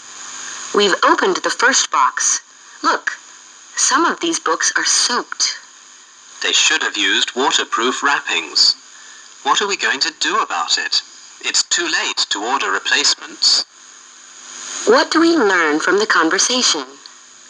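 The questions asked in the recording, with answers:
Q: What do we learn from the conversation?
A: Some books were soaked and it's too late to order replacements.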